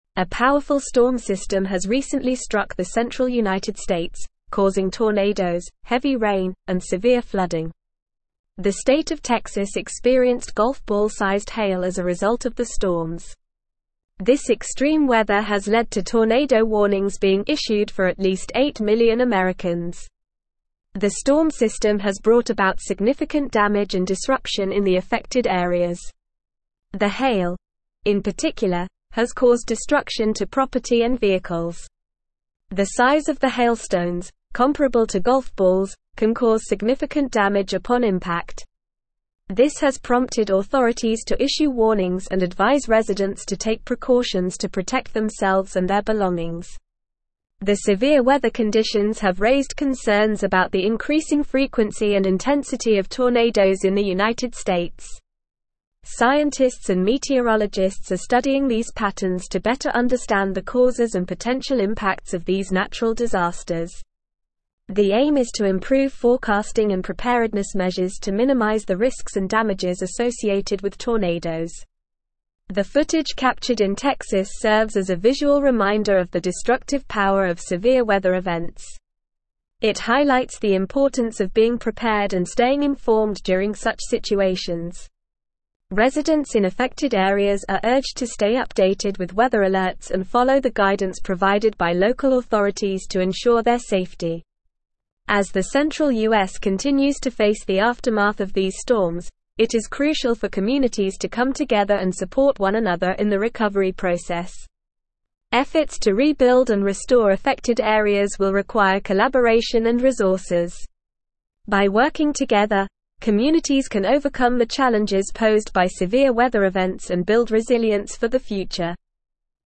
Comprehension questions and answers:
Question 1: A powerful (1)______ system has recently struck the central United States, causing tornadoes, heavy rain, and severe flooding.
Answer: storm

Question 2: The state of Texas (2)______ golf ball-sized hail as a result of the storms.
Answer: experienced

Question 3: This extreme weather has led to tornado warnings being issued for at least 8 million (3)______.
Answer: Americans

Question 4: The hail, in (4)______, has caused destruction to property and vehicles.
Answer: particular

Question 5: The size of the hailstones, comparable to golf balls, can (5)______ significant damage upon impact.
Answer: cause

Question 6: This has prompted authorities to issue warnings and advise residents to take precautions to protect themselves and their (6)______.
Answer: belongings

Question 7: The severe weather conditions have (7)______ concerns about the increasing frequency and intensity of tornadoes in the United States.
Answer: raised

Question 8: Scientists and meteorologists are studying these patterns to better (8)______ the causes and (9)______ impacts of these natural disasters.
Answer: understand

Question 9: Scientists and meteorologists are studying these patterns to better (8)______ the causes and (9)______ impacts of these natural disasters.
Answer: potential

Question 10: The aim is to improve forecasting and (10)______ measures to minimize the risks and damages associated with tornadoes.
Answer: preparedness

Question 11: The footage captured in Texas serves as a visual reminder of the destructive power of severe (11)______ events.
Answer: weather

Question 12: It highlights the importance of being prepared and (12)______ informed during such situations.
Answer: staying

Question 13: Efforts to (13)______ and restore affected areas will (15)______ collaboration and resources.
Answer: rebuild

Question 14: By working together, communities can overcome the challenges (16)______ by severe weather events and (14)______ resilience for the future.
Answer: build

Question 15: Efforts to (13)______ and restore affected areas will (15)______ collaboration and resources.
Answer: require

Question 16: By working together, communities can overcome the challenges (16)______ by severe weather events and (14)______ resilience for the future.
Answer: posed

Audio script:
A powerful storm system has recently struck the central United States, causing tornadoes, heavy rain, and severe flooding. The state of Texas experienced golf ball-sized hail as a result of the storms. This extreme weather has led to tornado warnings being issued for at least 8 million Americans.
The storm system has brought about significant damage and disruption in the affected areas. The hail, in particular, has caused destruction to property and vehicles. The size of the hailstones, comparable to golf balls, can cause significant damage upon impact. This has prompted authorities to issue warnings and advise residents to take precautions to protect themselves and their belongings.
The severe weather conditions have raised concerns about the increasing frequency and intensity of tornadoes in the United States. Scientists and meteorologists are studying these patterns to better understand the causes and potential impacts of these natural disasters. The aim is to improve forecasting and preparedness measures to minimize the risks and damages associated with tornadoes.
The footage captured in Texas serves as a visual reminder of the destructive power of severe weather events. It highlights the importance of being prepared and staying informed during such situations. Residents in affected areas are urged to stay updated with weather alerts and follow the guidance provided by local authorities to ensure their safety.
As the central US continues to face the aftermath of these storms, it is crucial for communities to come together and support one another in the recovery process. Efforts to rebuild and restore affected areas will require collaboration and resources. By working together, communities can overcome the challenges posed by severe weather events and build resilience for the future.

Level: Level 4